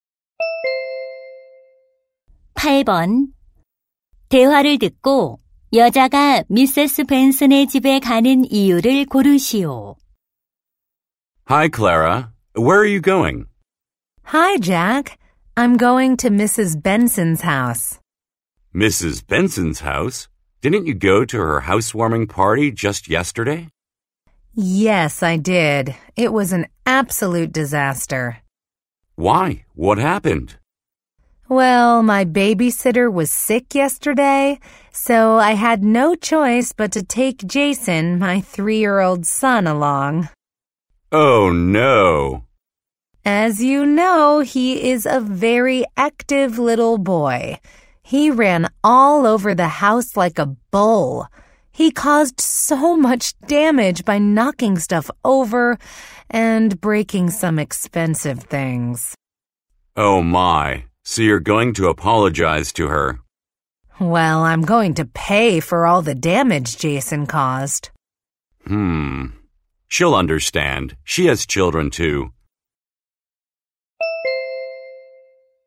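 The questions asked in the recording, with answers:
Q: 대화를 듣고 여자가 미세스 벤슨의 집에 가는 이유를 고르시오.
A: 아들이 낸 피해를 배상하려고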